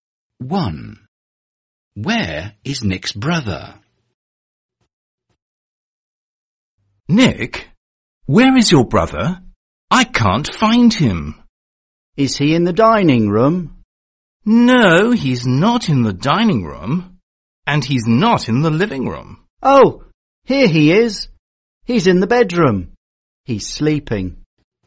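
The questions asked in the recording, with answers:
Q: Where is Nick's brother?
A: In the bedroom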